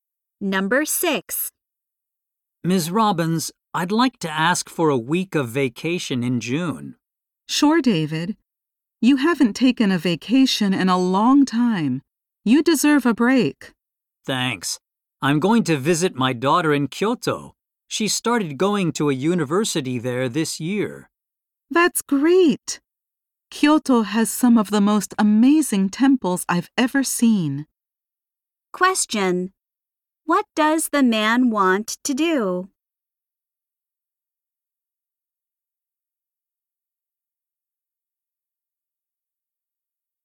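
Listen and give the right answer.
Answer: Take a week of vacation to visit his daughter in Kyoto.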